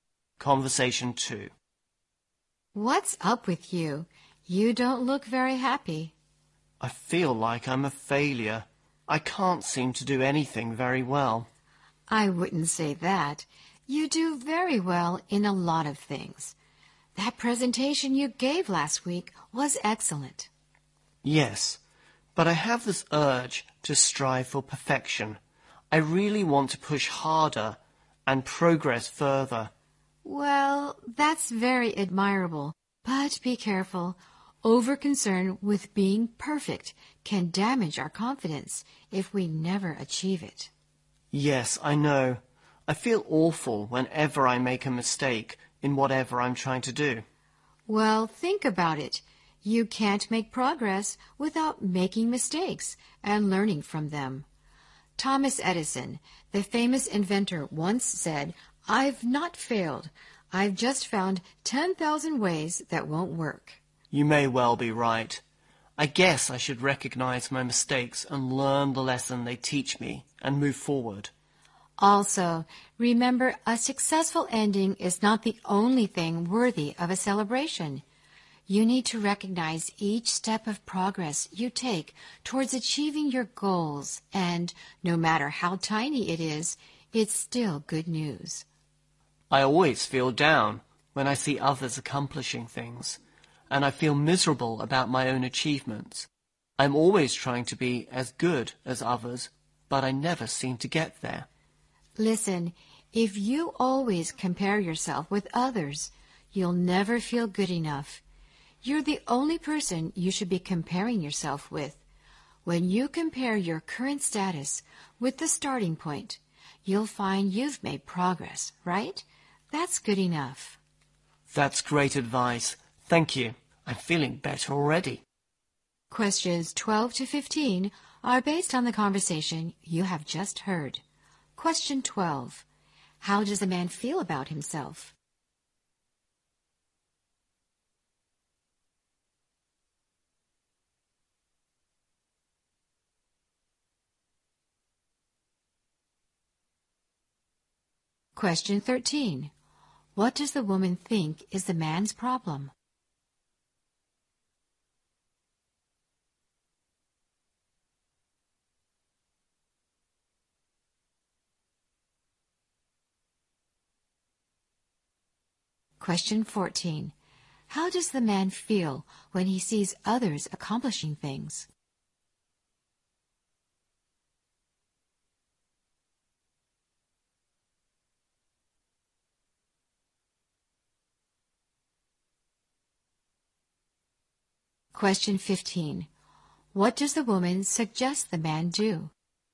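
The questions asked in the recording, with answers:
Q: How does a man feel about himself?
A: He feels like a failure

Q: What does the woman think is the man's problem?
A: He is over-concerned with being perfect

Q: How does the man feel when he sees others accomplishing things?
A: Down and miserable about his own achievements

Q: What does the woman suggest the man do?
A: Compare himself only with himself, not others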